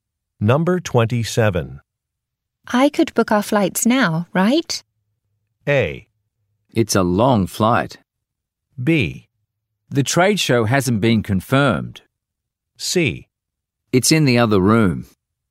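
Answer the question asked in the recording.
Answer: B: The trade show hasn't been confirmed.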